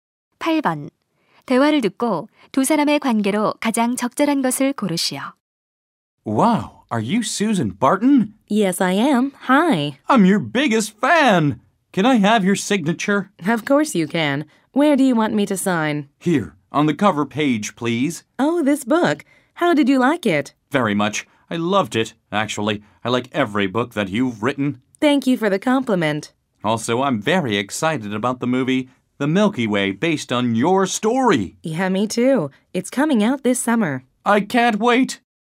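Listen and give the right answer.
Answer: 작가와 팬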